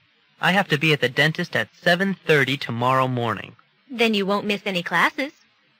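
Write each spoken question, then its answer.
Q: What does the woman imply?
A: The man's appointment is early enough that he won't miss any classes.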